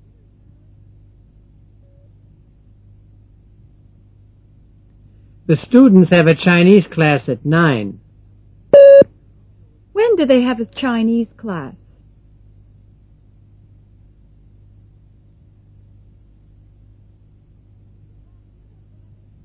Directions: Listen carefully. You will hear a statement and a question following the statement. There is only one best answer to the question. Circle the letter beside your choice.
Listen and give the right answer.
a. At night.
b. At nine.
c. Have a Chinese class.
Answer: b. At nine.

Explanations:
The students have a Chinese class at nine.